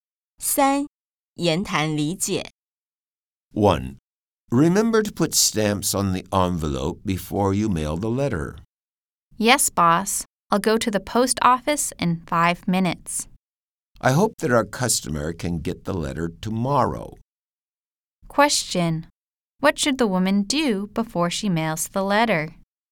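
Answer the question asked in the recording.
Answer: Put stamps on the envelope.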